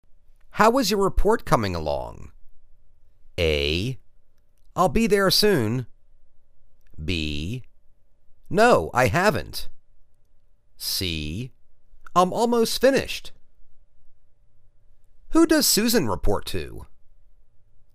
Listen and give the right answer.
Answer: I'm almost finished.